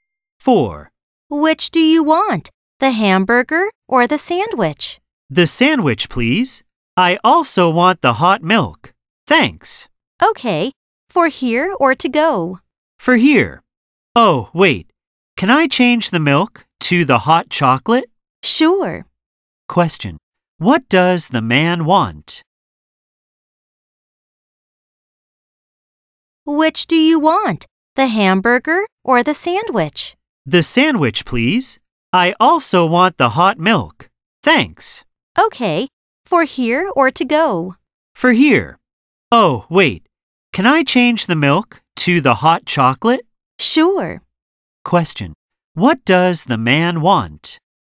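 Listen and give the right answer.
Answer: A sandwich and hot chocolate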